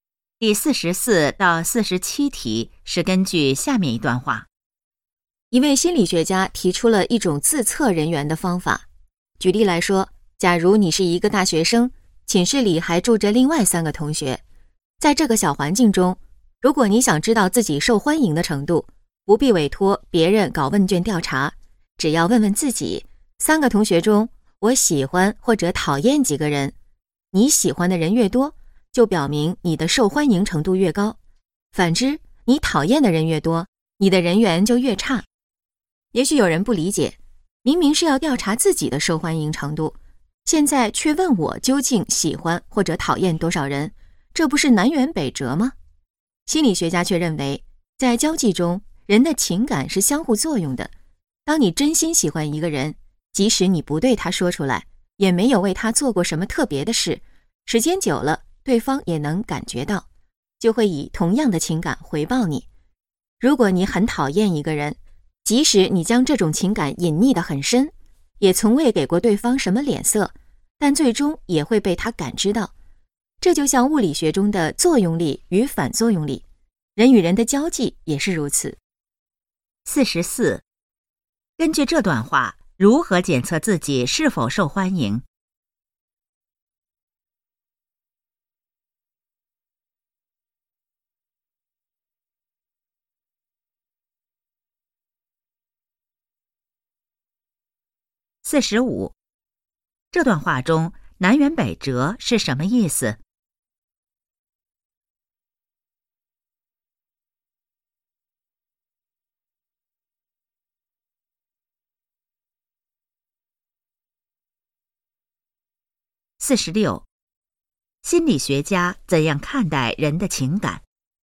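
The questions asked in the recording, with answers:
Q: 根据这段话,如何检测自己是否受欢迎?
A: 问自己喜欢或讨厌几个同学

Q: 这段话中南辕北辙是什么意思?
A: 行动和目的相反

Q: 心理学家怎样看待人的情感?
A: 是相互作用的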